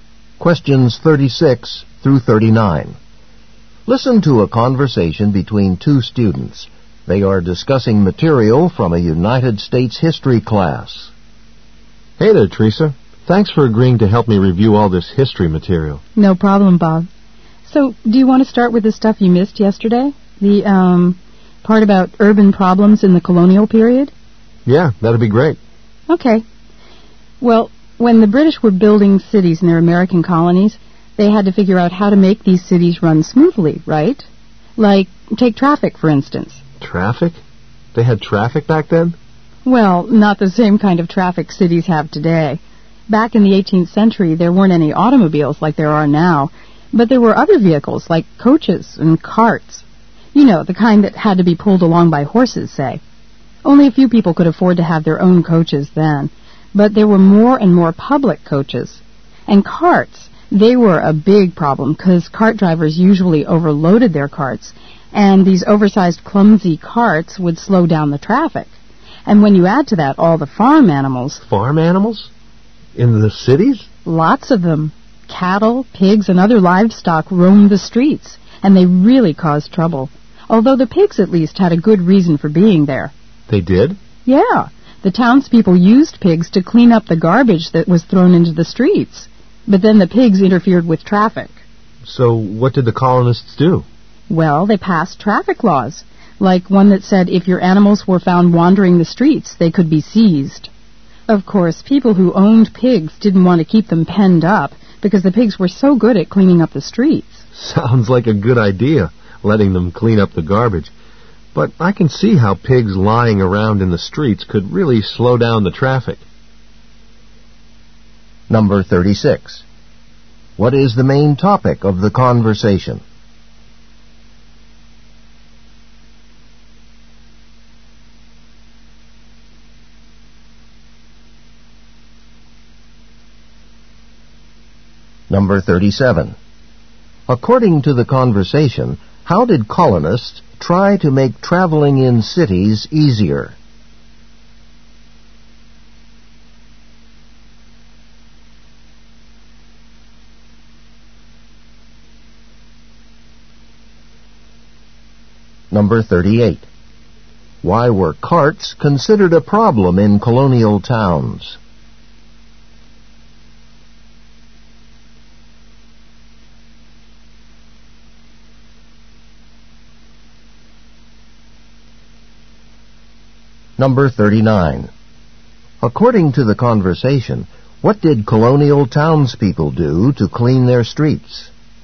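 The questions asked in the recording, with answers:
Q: What is the main topic of the conversation?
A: Traffic problems in colonial cities.

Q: According to the conversation, how did colonists try to make traveling in cities easier?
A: They passed traffic laws.

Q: Why were carts considered a problem in colonial towns?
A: They were overloaded and slowed traffic.

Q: According to the conversation, what did colonial townspeople do to clean their streets?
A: They used pigs to eat the garbage.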